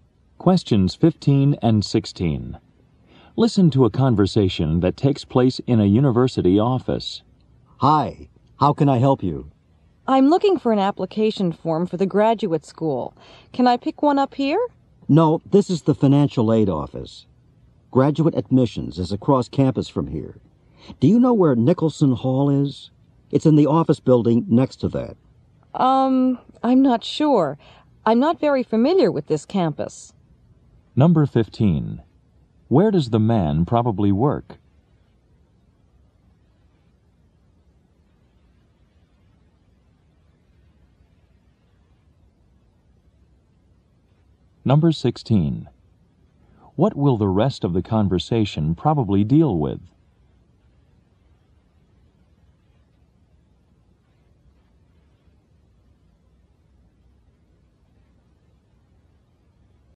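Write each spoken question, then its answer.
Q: Where does the man probably work?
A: In the financial aid office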